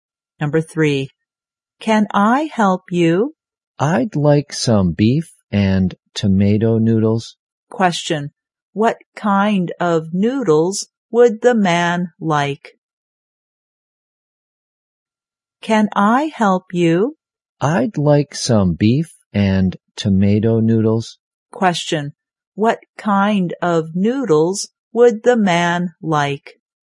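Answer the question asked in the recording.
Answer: Beef and tomato noodles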